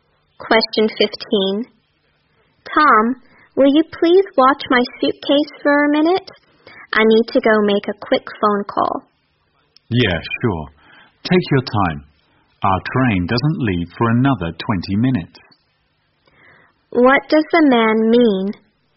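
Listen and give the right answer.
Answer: He will watch the suitcase; there's no hurry because the train leaves in 20 minutes.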